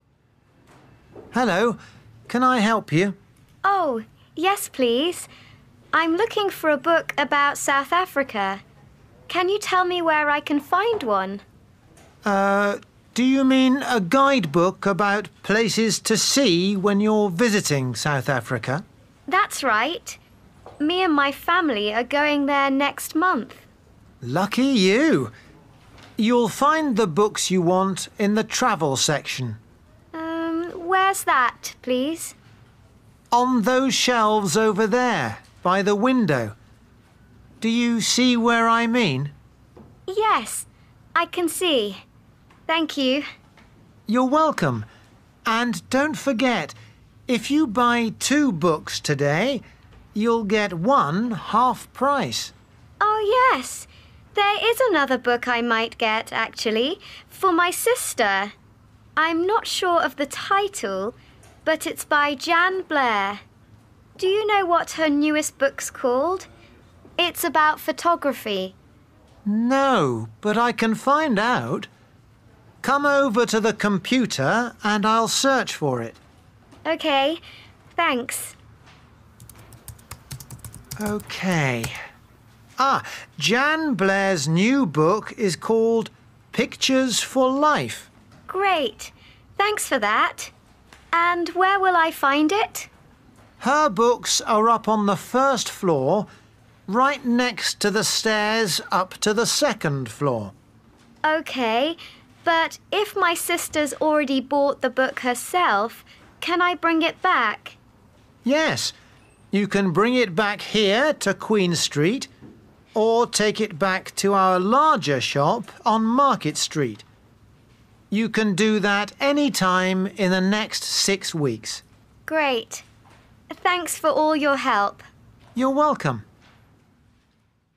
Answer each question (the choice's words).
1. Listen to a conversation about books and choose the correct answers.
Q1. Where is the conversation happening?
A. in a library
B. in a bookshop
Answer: in a bookshop

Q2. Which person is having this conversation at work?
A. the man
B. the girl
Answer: the man

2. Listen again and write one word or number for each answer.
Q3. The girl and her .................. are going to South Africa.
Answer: family

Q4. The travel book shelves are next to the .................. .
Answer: window

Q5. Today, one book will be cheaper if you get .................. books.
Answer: two/2

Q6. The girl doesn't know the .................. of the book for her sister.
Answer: title

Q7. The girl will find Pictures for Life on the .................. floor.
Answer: first

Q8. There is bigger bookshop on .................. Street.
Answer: Market

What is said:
Man: Hello, can I help you?
Girl: Oh yes, please. I'm looking for a book about South Africa. Can you tell me where I can find one?
Man: Er, do you mean a guidebook about places to see when you're visiting South Africa?
Girl: That's right. Me and my family are going there next month.
Man: Lucky you! You'll find the books you want in the travel section.
Girl: Where's that, please?
Man: On those shelves over there, by the window. Do you see where I mean?
Girl: Yes, I can see. Thank you.
Man: You're welcome. And don't forget: if you buy two books today, you'll get one half price.
Girl: Oh yes. There is another book I might get, actually, for my sister. I'm not sure of the title, but it's by Jan Blair. Do you know what her newest book's called? It's about photography.
Man: No, but I can find out. Come over to the computer and I'll search for it.
Girl: OK, thanks.
Man: OK ... Ah, Jan Blair's new book is called Pictures for Life.
Girl: Great, thanks for that. And where will I find it?
Man: Her books are up on the first floor, right next to the stairs up to the second floor.
Girl: OK. But if my sister's already bought the book herself, can I bring it back?
Man: Yes, you can bring it back here to Queen Street, or take it back to our larger shop on Market Street. You can do that any time in the next six weeks.
Girl: Great. Thanks for all your help.
Man: You're welcome.